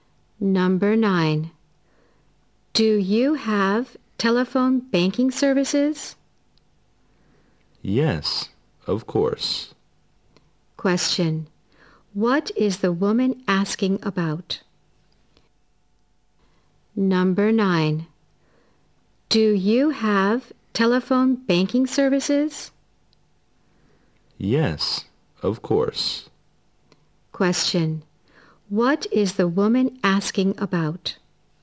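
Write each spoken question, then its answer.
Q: What is the woman asking about?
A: Telephone banking services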